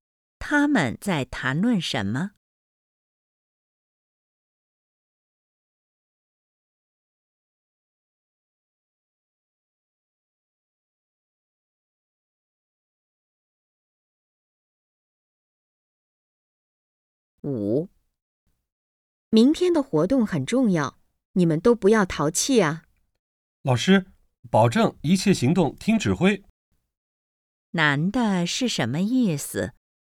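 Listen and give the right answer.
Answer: 保证一切行动听指挥,不会淘气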